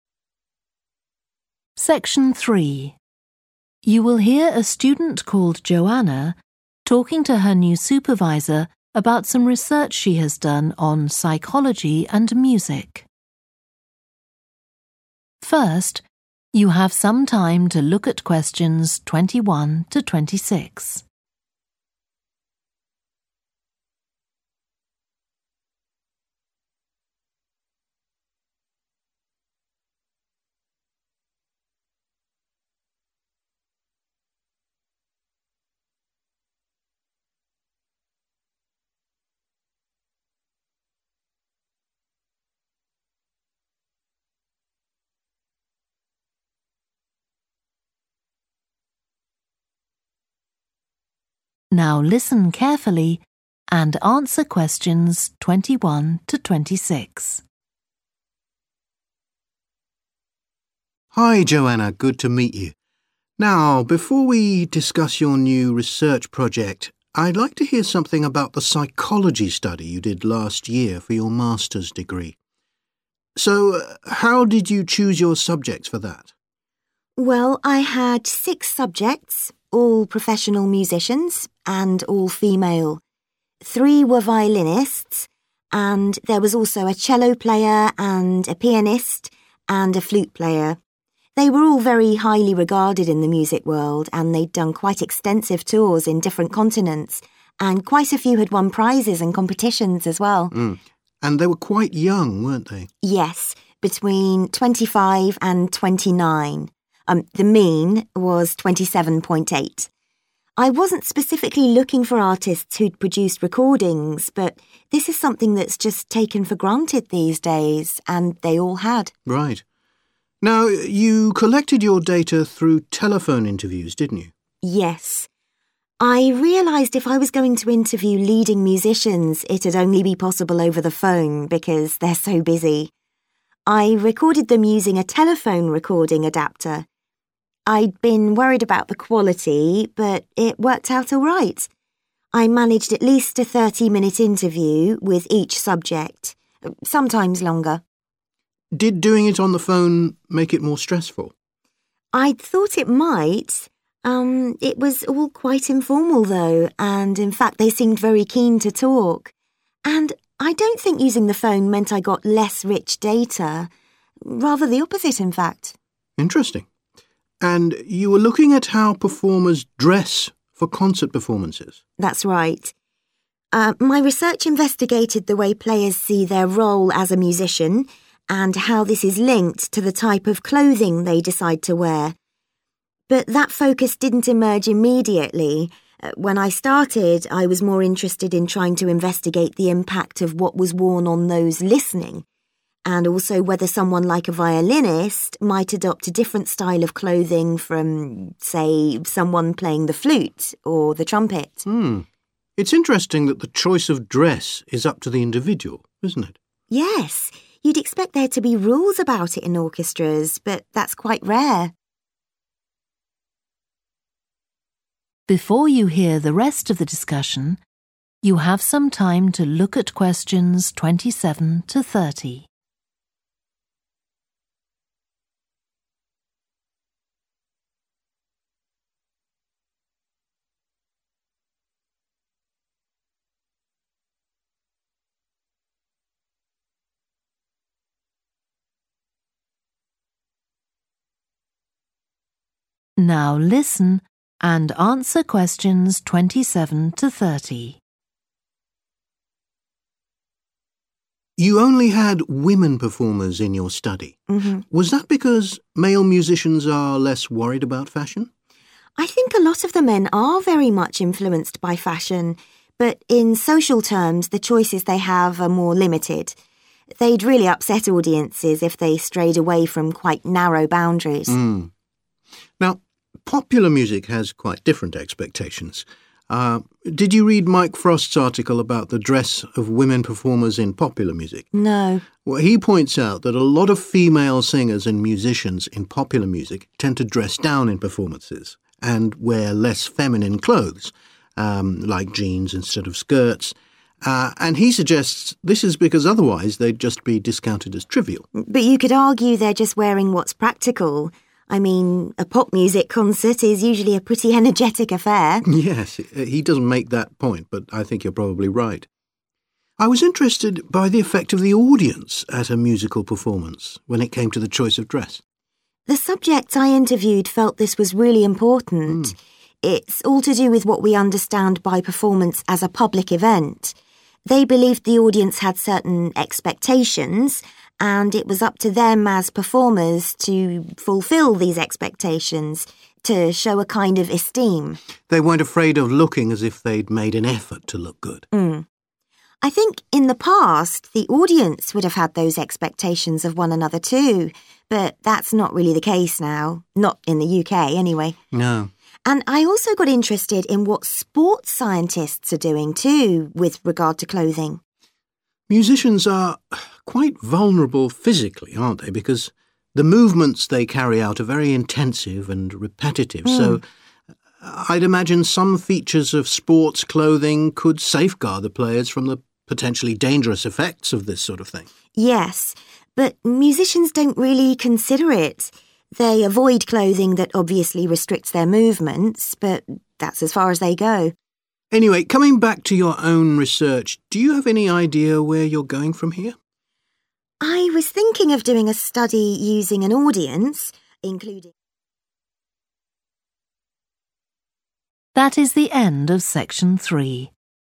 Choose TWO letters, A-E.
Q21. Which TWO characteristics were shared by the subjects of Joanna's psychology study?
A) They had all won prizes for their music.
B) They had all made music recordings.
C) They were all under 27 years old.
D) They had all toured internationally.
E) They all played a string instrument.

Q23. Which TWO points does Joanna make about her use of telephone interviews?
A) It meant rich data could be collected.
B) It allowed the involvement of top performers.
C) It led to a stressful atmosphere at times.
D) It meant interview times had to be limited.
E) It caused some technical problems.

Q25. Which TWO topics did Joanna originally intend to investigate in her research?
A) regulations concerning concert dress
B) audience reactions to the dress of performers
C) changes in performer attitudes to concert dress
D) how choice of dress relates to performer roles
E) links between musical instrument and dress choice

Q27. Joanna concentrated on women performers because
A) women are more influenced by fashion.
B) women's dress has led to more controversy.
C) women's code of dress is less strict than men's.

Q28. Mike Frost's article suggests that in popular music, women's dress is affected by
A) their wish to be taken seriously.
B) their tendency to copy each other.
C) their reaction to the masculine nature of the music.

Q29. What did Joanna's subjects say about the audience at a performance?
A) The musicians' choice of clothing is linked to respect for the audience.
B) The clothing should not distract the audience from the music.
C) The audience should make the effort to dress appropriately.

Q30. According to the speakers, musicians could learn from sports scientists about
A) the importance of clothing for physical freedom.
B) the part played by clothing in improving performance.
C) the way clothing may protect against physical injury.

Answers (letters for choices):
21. B
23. A
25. B
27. C
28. A
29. A
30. C

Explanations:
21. The correct answer is B and D because the subjects in Joanna's study shared the traits of having made music recordings (choice B) and having toured internationally (choice D), as mentioned in the excerpt where it is highlighted that the subjects had done extensive tours and all had produced music recordings.
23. The correct answer is A because in the excerpt, Joanna mentions that using the phone did not result in less rich data. Instead, she implies that she actually received richer data through phone interviews.
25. The correct answer matches with the topics Joanna originally intended to investigate, which were related to the connections between performers' dress choices and their roles, as well as the possible links between musicians and the attire they choose based on the instruments they play.
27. The correct answer is supported by the excerpt because it highlights how women performers have limited choices and must stay within certain boundaries regarding their attire. This contrasts with men, indicating that women may have more flexibility or freedom in their dress code, which aligns with answer choice C.
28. The correct answer is A because it aligns with the idea that women dress a certain way in popular music to avoid being dismissed as unimportant, as mentioned in the excerpt. Choosing to dress seriously helps them prevent being overlooked.
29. The correct answer is A because the excerpt implies that the performers believed they needed to fulfill the audience's expectations as a sign of esteem. This aligns with the idea that the musicians' clothing choice is linked to respect for the audience.
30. The correct answer is C, the way clothing may protect against physical injury, because the excerpt mentions that sports clothing can safeguard players from dangerous effects, indicating a protective role in preventing harm during sports activities.

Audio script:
SUPERVISOR: Hi, Joanna, good to meet you. Now, before we discuss your new research project. I'd like to hear something about the psychology study you did last year for your Master's degree. So how did you choose your subjects for that?
JOANNA: Well, I had six subjects, all professional musicians, and all female. There were violinists and there was also a cello player and a pianist and a flute player. They were all very highly regarded in the music world and they'd done quite extensive tours in different continents, and quite a few had won prizes and competitions as well.
SUPERVISOR: And they were quite young, weren't they?
JOANNA: Yes, between 25 and 29 – the mean was 27.8. I wasn't specifically look for artists who'd produced recordings, but this is something that's just taken for granted these days, and they all had.
SUPERVISOR: Right. Now you collected your data through telephone interviews, didn't you?
JOANNA: Yes. I realised if I was going to interview leading musicians it's only be possible over the phone because they're so busy. I recorded them using a telephone recording adaptor. I'd been worried about the quality, but it worked out all right. I managed at least a 30-minute interview with each subject, sometimes longer.
SUPERVISOR: Did doing it on the phone make it more stressful?
JOANNA: I'd thought it might ... it was all quite informal though and in fact they seemed very keen to talk. And I don't think using the phone meant I got less rich data rather the opposite in fact.
SUPERVISOR: Interesting. And you were looking at how performers dress for concert performances?
JOANNA: That's right. My research investigated the way players see their role as a musician and how this is linked to the type of clothing they decide to wear. But that focus didn't emerge immediately. When I started I was more interested in trying to investigate the impact of what was worn on those listening, and also whether someone like a violinist might adopt a different style of clothing from, say, someone playing the flute or the trumpet.
SUPERVISOR: It's interesting that the choice of dress is up to the individual, isn't it?
JOANNA: Yes, you'd expect there to be rules about it in orchestras, but that's quite rare.
SUPERVISOR: You only had women performers in your study. Was that because male musicians are less worried about fashion?
JOANNA: I think a lot of the men are very much influenced by fashion, but in social terms the choices they have are more limited ... they'd really upset audiences if they strayed away from quite narrow boundaries.
SUPERVISOR: Hmm. Now, popular music has quite different expectations. Did you read Mike Frost's article about the dress of women performers in popular music?
JOANNA: No.
SUPERVISOR: He points out that a lot of female singers and musicians in popular music tend to dress down in performances, and wear less feminine clothes, like jeans instead of skirts, and he suggests this is because otherwise they'd just be discounted as trivial.
JOANNA: But you could argue they're just wearing what's practical ... I mean, a pop-music concert is usually a pretty energetic affair.
SUPERVISOR: Yes, he doesn't make that point, but I think you're probably right. I was interested by the effect of the audience at a musical performance when it came to the choice of dress.
JOANNA: The subjects I interviewed felt this was really important. It's all to do with what we understand by performance as a public event. They believed the audience had certain expectations and it was up to them as performers to fulfil these expectations to show a kind of esteem ...
they weren't afraid of looking as if they'd made an effort to look good.
I think in the past the audience would have had those expectation of one another too, but that's not really the case now, not in the UK anyway.
SUPERVISOR: No.
JOANNA: And I also got interested in what sports scientists are doing too, with regard to clothing.
SUPERVISOR: Musicians are quite vulnerable physically, aren't they, because the movements they carry out are very intensive and repetitive, so I'd imagine some features of sports clothing could safeguard the players from the potentially dangerous effects of this sort of thing.
JOANNA: Yes, but musicians don't really consider it. They avoid clothing that obviously restricts their movements, but that's as far as they go.
SUPERVISOR: Anyway, coming back to your own research, do you have any idea where you're going from here?
JOANNA: I was thinking of doing a study using an audience, including ..